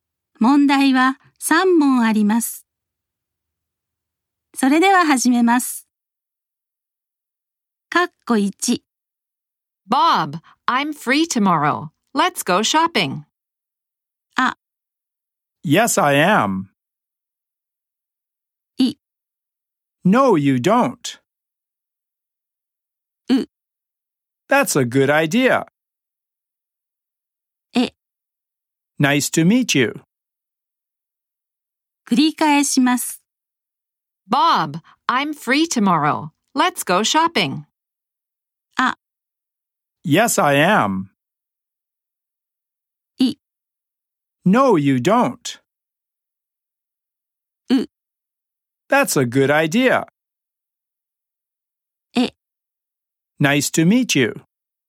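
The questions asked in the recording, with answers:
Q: Bob, I'm free tomorrow. Let's go shopping.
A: う: That's a good idea.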